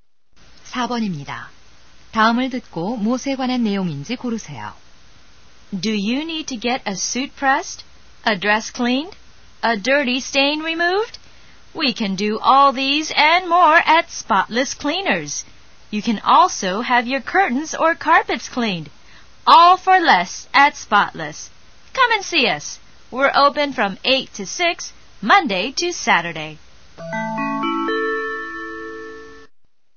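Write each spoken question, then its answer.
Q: 다음을 듣고 무엇에 관한 내용인지 고르세요.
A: 세탁소 광고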